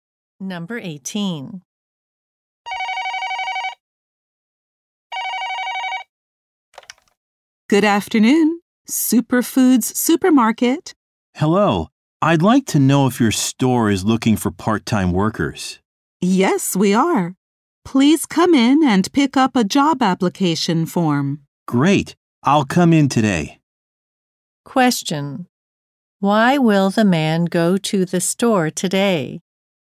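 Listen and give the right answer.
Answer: To pick up a job application form.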